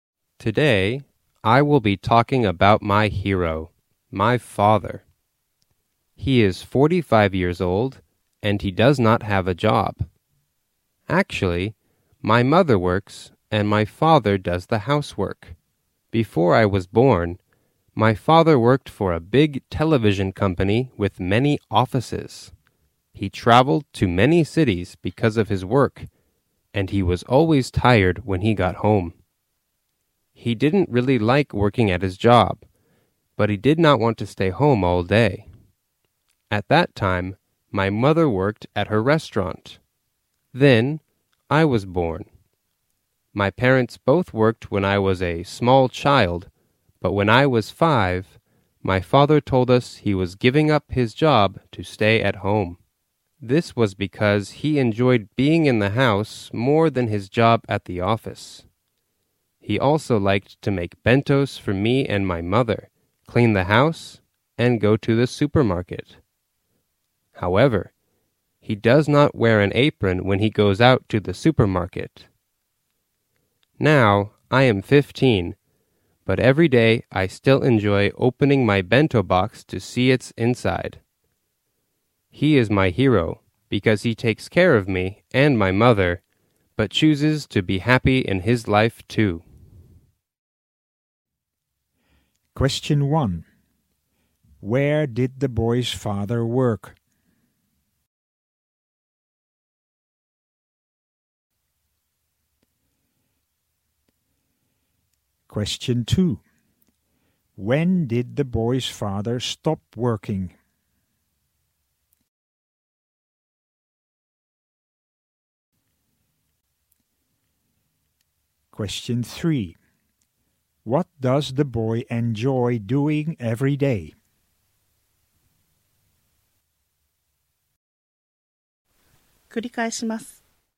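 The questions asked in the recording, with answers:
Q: Where did the boy's father work?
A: At a big television company

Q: When did the boy's father stop working?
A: When the boy was 5

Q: What does the boy enjoy doing every day?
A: Opening his bento box to see what is inside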